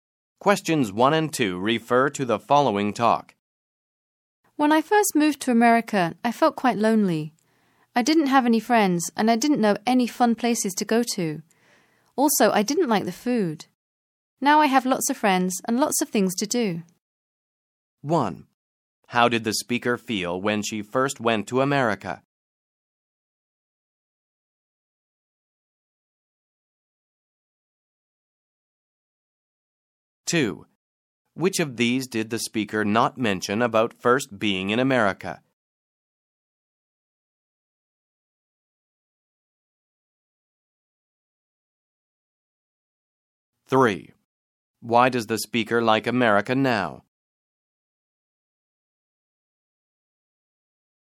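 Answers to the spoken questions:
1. Quite lonely
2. She has lots of friends and lots of things to do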